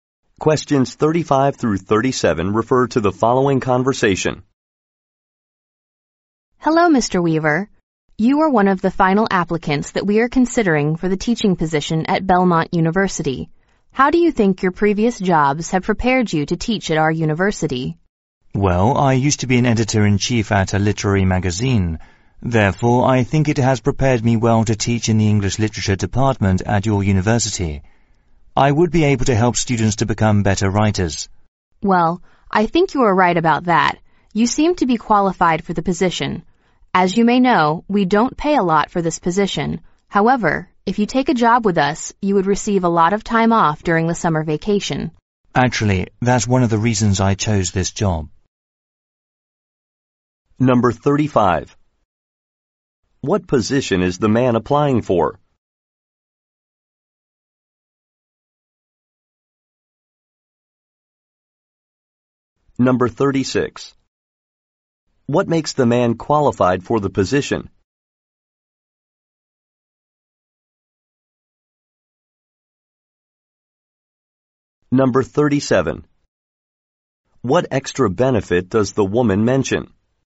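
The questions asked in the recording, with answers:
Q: What position is the man applying for?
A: A university teaching position

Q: What makes the man qualified for the position?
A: He was editor-in-chief of a literary magazine

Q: What extra benefit does the woman mention?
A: Lots of time off during summer vacation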